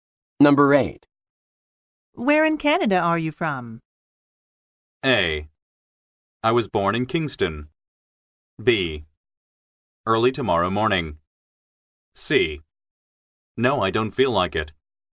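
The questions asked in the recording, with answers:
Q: Where in Canada are you from?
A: A: I was born in Kingston.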